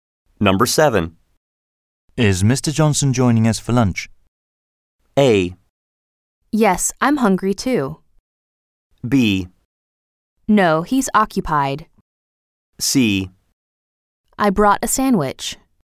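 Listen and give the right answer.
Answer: B: No, he's occupied.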